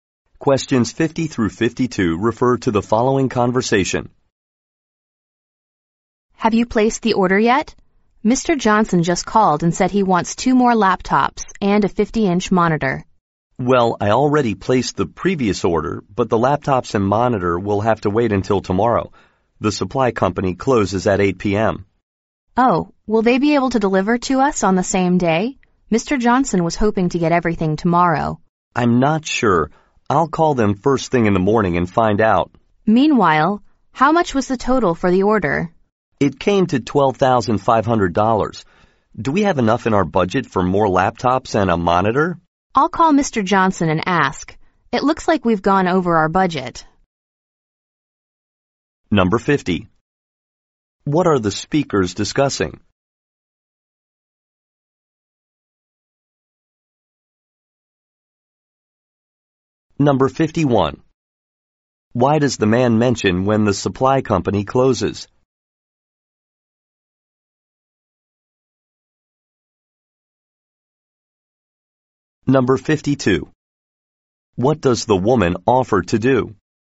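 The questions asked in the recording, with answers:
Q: What are the speakers discussing?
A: An order of laptops and a monitor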